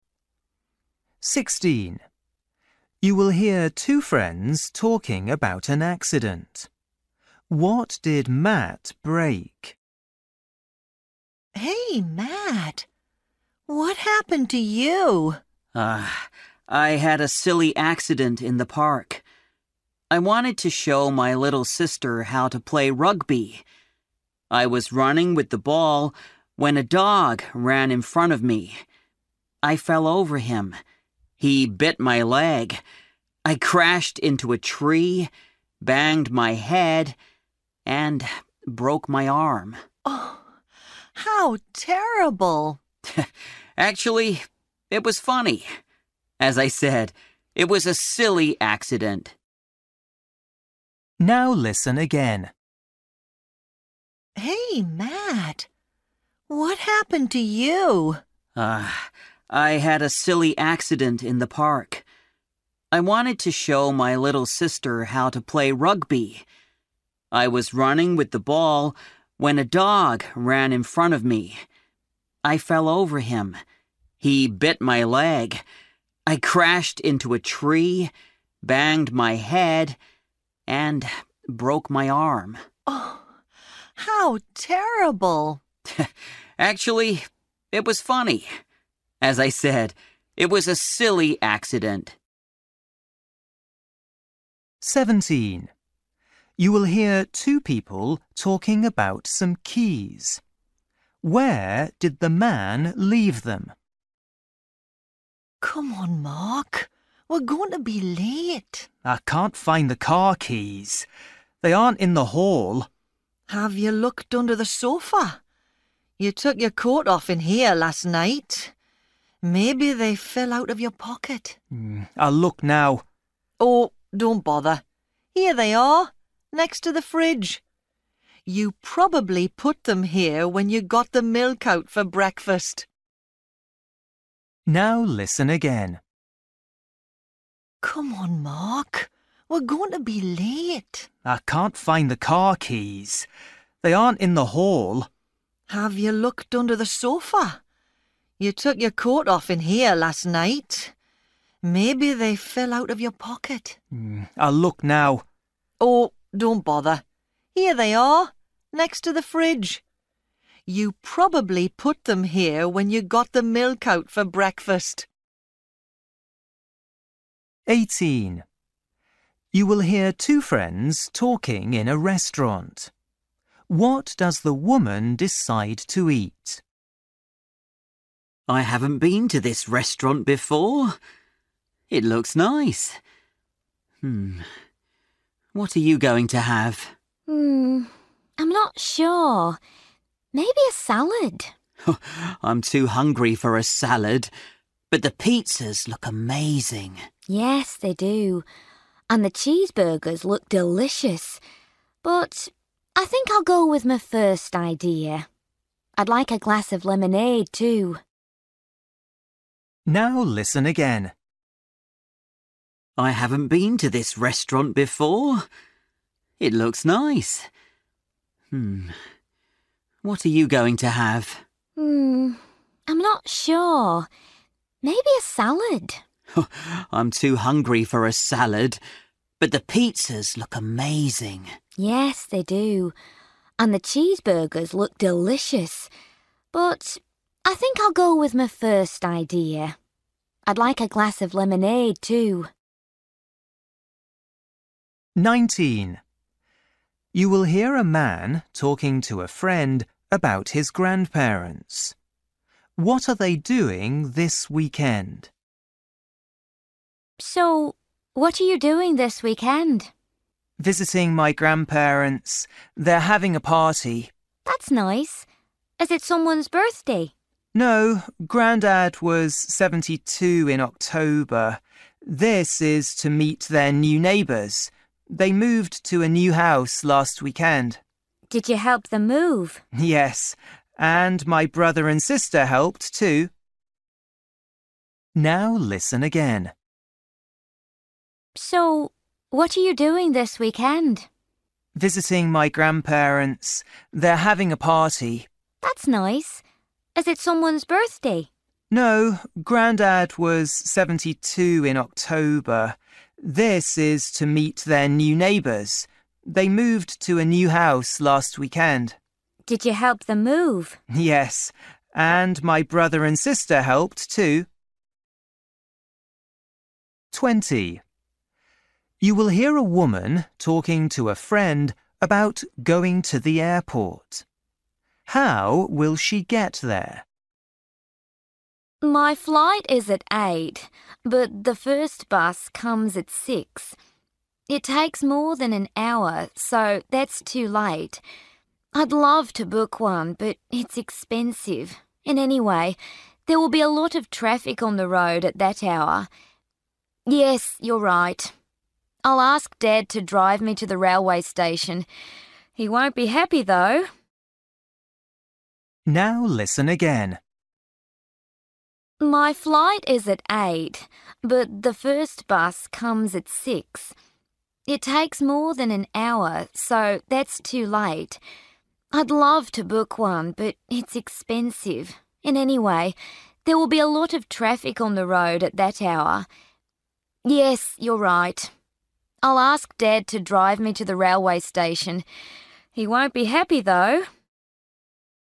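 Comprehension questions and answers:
For each question, choose the correct answer.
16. You will hear two friends talking about an accident. What did Matt break?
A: his arm

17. You will hear two people talking about some keys. Where did the man leave them?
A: next to the fridge

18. You will hear two friends talking in a restaurant. What does the woman decide to eat?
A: a salad

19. You will hear a man talking a friend about his grandparents. What are they doing this weekend?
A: having a party to meet their new neighbours

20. You will hear a woman talking to a friend about going to the airport. How will she get there?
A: by train (Dad drives her to the railway station)

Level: Luyện nghe trình độ A2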